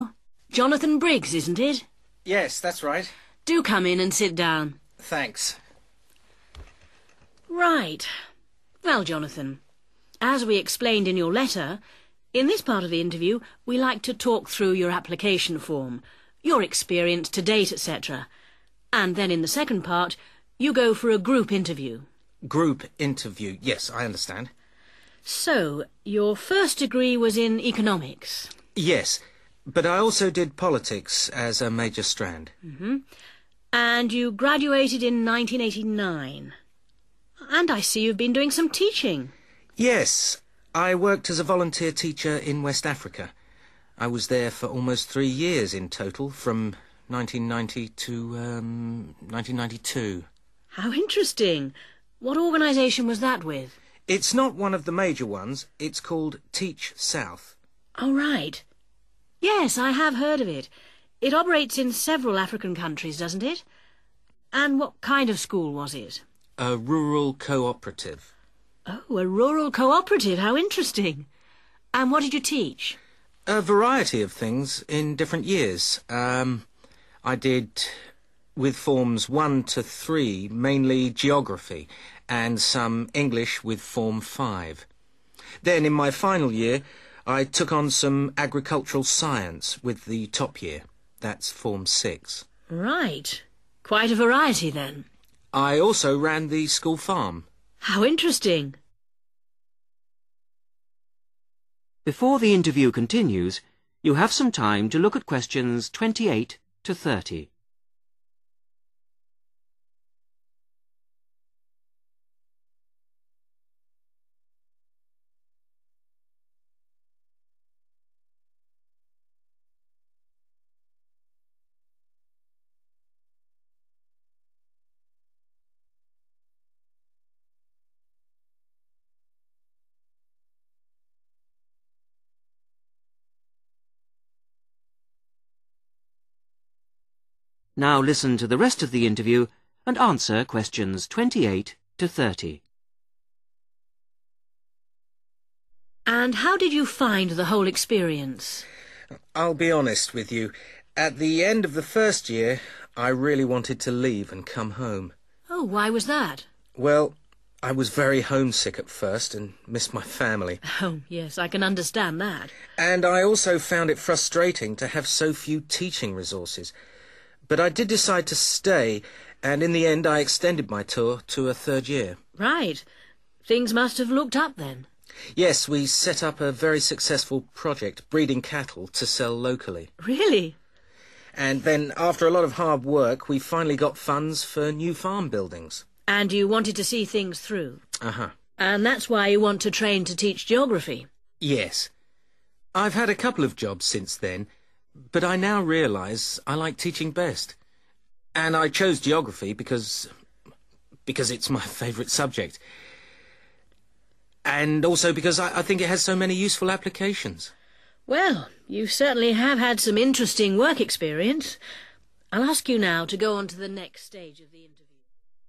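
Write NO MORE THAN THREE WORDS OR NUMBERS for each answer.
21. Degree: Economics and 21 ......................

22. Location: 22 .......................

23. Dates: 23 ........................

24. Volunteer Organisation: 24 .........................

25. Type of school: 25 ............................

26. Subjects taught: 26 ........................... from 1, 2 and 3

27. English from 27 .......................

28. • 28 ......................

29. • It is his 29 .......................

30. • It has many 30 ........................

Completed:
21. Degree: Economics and politics
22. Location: West Africa
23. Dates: 1990 to 1992
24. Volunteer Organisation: Teach South
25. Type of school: rural cooperative
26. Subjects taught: geography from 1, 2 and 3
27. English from form 5
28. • homesick
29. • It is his favourite subject
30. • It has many useful applications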